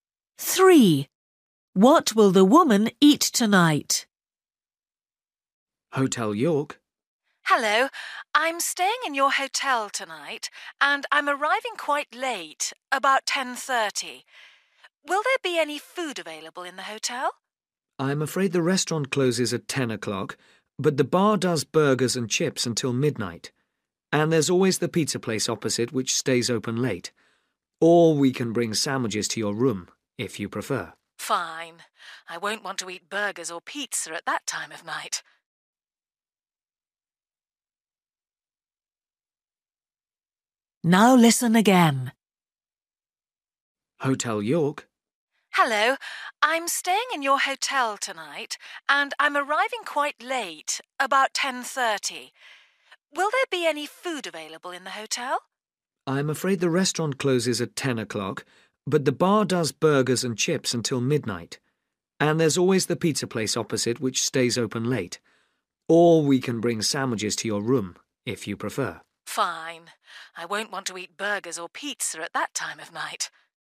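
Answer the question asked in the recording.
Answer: sandwiches in her room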